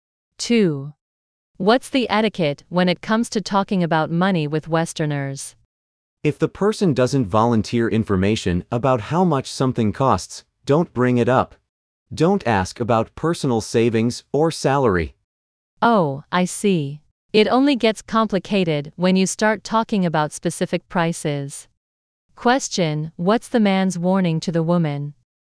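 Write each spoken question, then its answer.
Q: what's the man's warning to the woman?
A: Don't ask Westerners about prices, savings or salary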